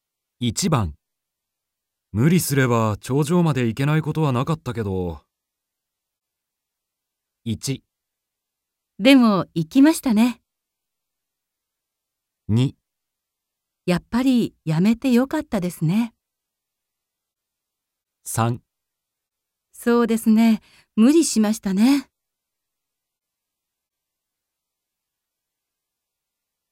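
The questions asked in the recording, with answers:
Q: 無理すれば頂上まで行けないことはなかったけど。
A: 2: やっぱりやめてよかったですね。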